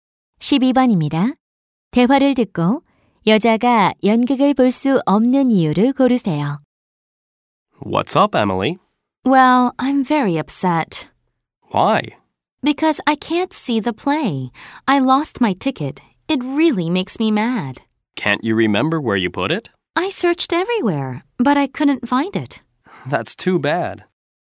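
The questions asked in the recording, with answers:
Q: 대화를 듣고 여자가 연극을 볼 수 없는 이유를 고르세요.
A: 표를 잃어버려서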